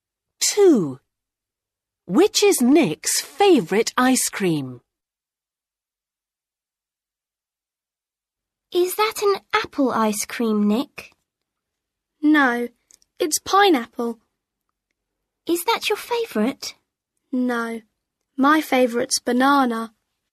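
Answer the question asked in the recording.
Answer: Banana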